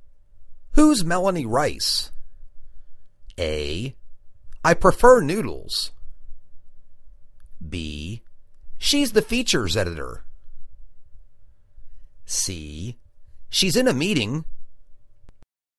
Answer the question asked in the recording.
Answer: She's the features editor.